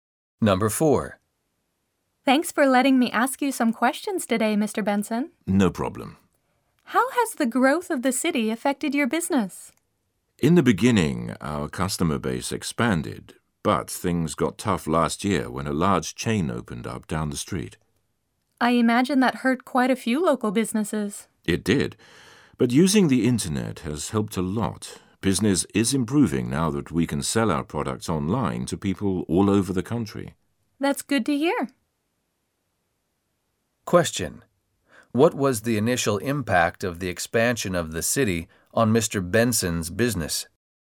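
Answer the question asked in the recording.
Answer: His customer base expanded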